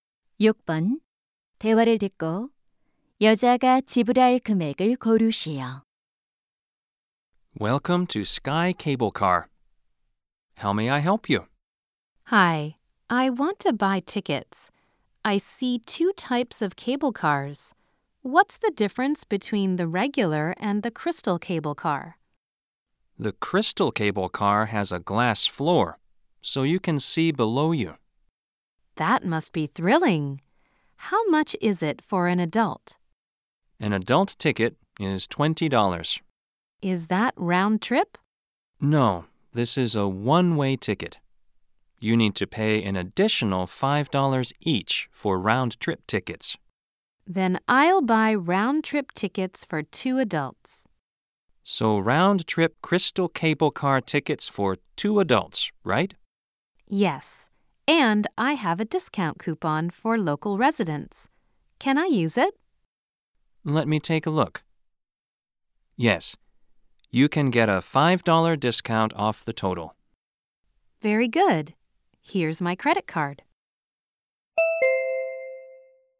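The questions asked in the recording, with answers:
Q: 대화를 듣고 여자가 지불할 금액을 고르시오.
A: $45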